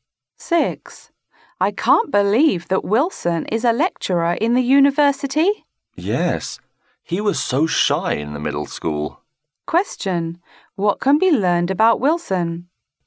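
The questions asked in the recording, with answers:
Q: What can be learned about Wilson?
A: He has changed a lot; he used to be shy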